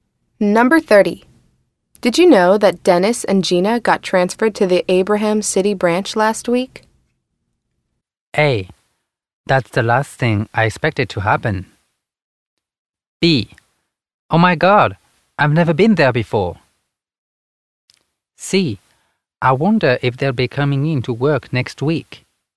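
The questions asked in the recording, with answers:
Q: Did you know that Dennis and Gina got transferred to the Abraham City branch last week?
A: A: That's the last thing I expected to happen.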